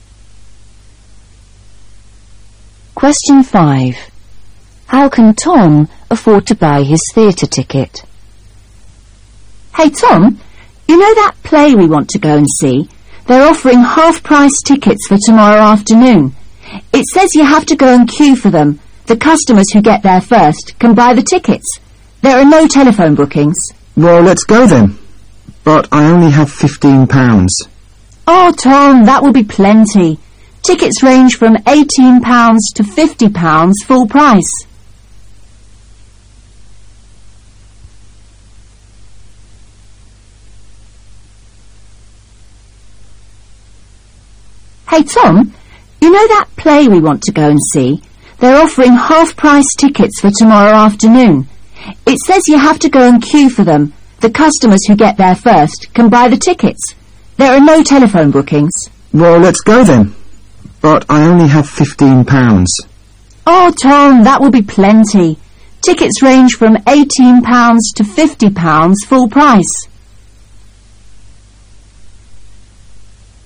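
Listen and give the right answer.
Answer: Tickets are half price (£9 to £25) if he queues tomorrow afternoon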